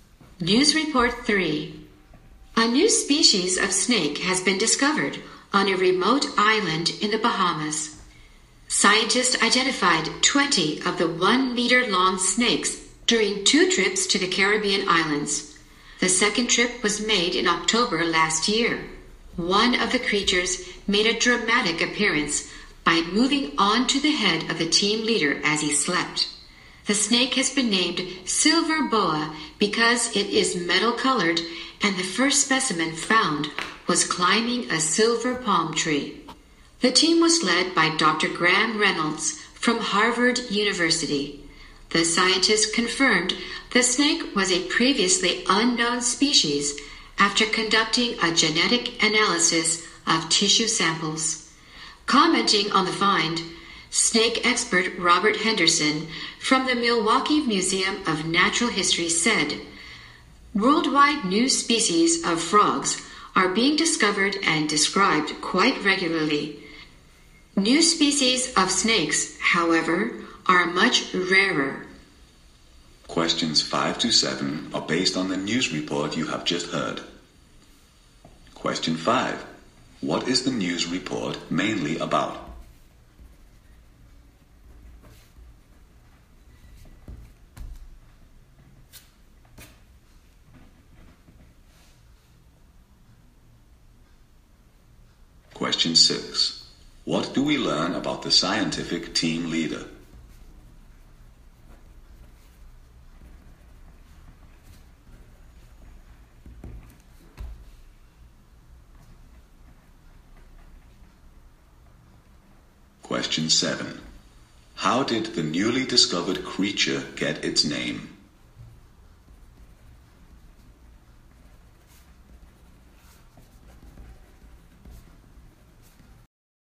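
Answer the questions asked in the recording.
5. The discovery of a new species of snake in the Bahamas
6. A snake moved onto his head while he slept
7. From its metal color and the silver palm tree the first one was found climbing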